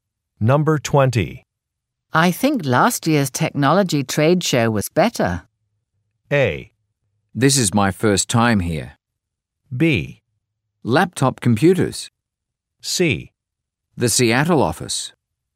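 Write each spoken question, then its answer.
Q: I think last year's technology trade show was better.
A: A: This is my first time here.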